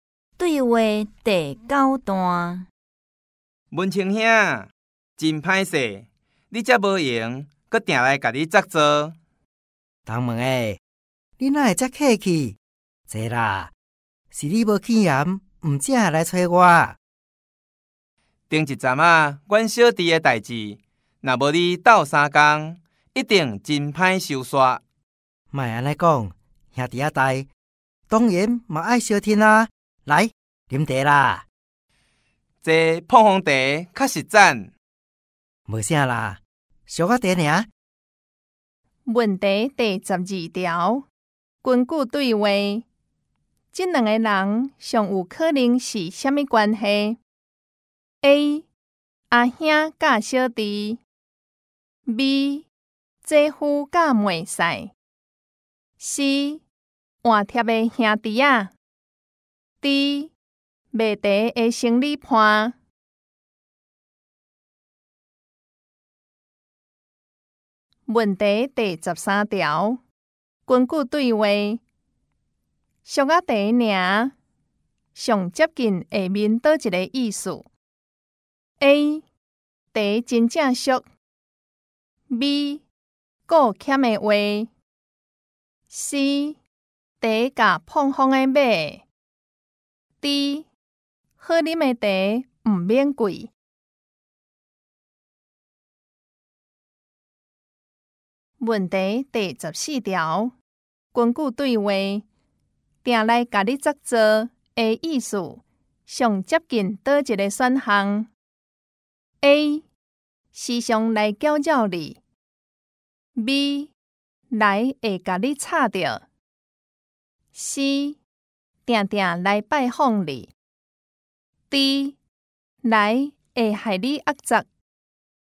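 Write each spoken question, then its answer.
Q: 根据对话,这两个人最有可能是什么关系 ?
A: C: 换贴的兄弟啊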